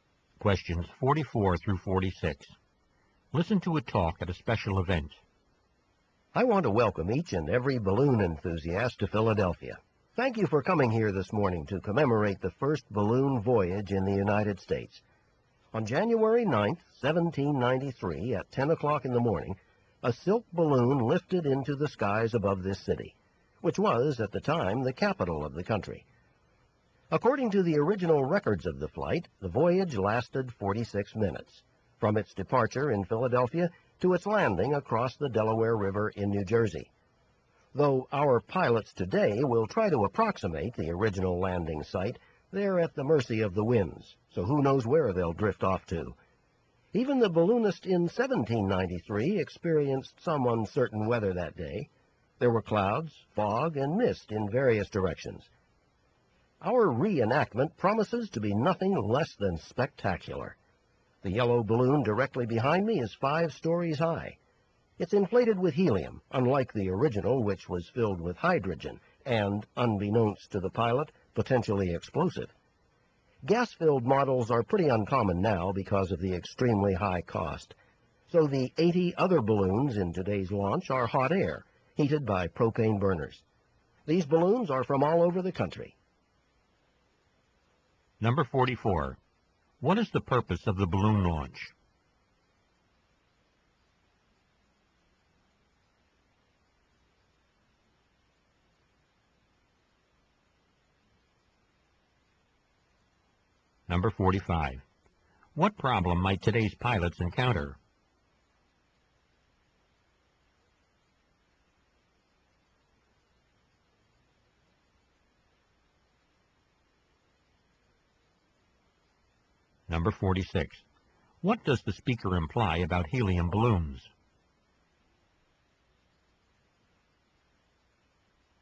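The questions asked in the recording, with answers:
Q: What is the purpose of the balloon launch?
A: To commemorate the first balloon voyage in the United States

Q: What problem might today's pilots encounter?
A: The winds might blow them away from the original landing site

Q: What does the speaker imply about helium balloons?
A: They are very expensive, so they are uncommon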